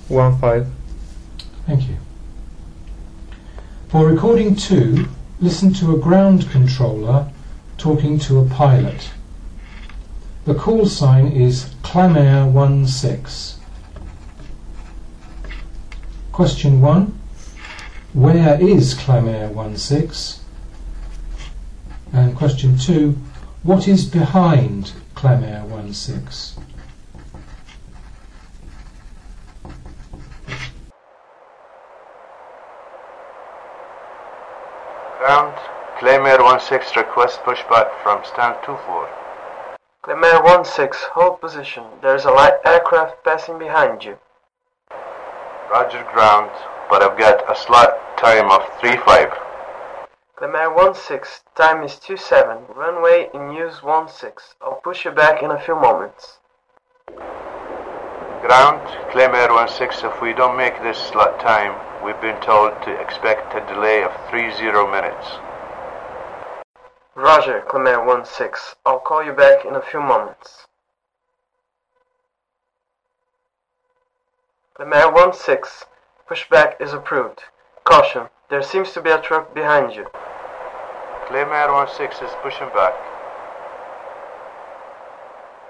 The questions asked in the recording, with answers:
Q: Where is Clamair 16?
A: The aircraft is in standard 24,